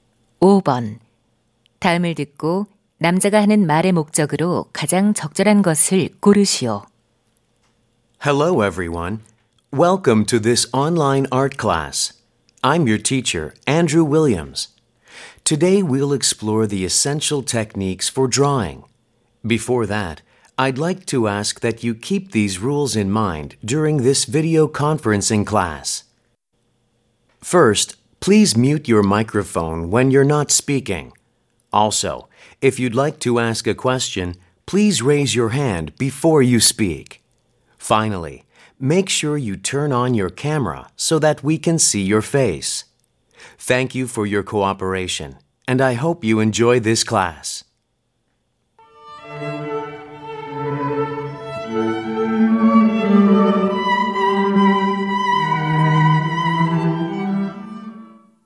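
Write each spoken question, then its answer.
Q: 다음을 듣고 남자가 하는 말의 목적으로 가장 적절한 것을 고르시오.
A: 화상 수업 규칙 안내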